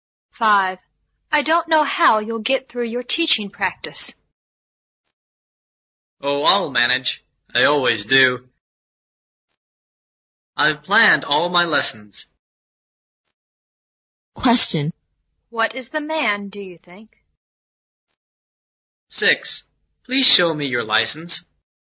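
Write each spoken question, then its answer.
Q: What is the man, do you think?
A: A student teacher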